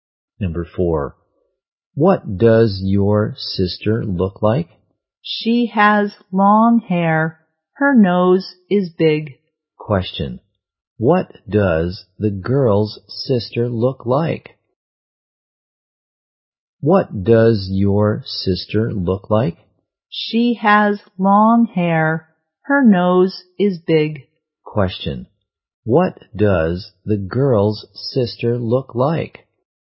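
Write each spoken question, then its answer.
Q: what does the girl's sister look like?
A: She has long hair and a big nose.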